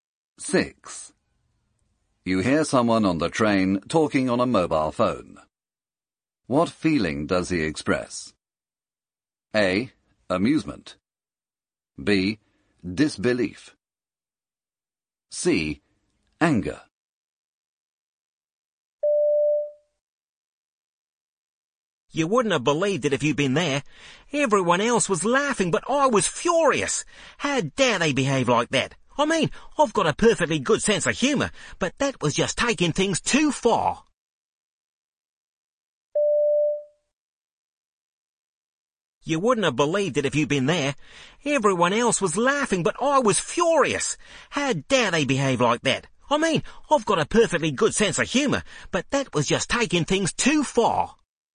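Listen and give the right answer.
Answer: C: Anger.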